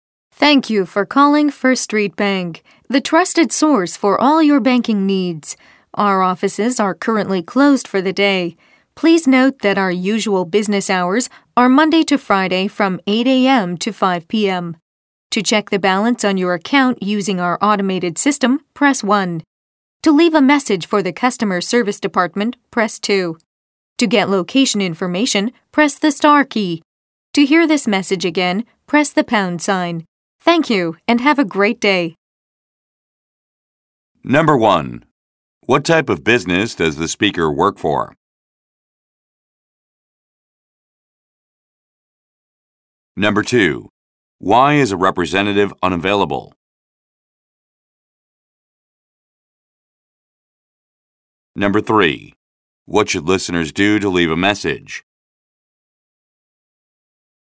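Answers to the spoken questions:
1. A bank
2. The offices are closed for the day
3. Press 2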